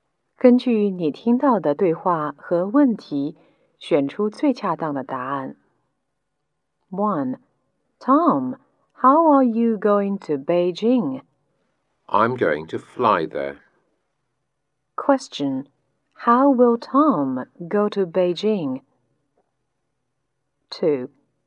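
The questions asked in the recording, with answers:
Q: How will Tom go to Beijing?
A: By plane.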